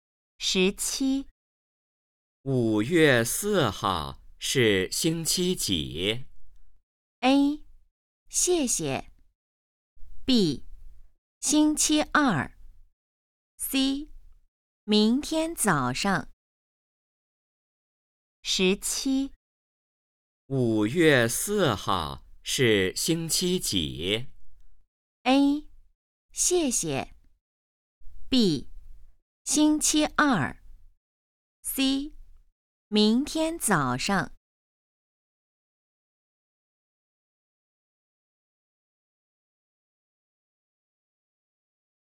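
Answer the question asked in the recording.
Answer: B: 星期二。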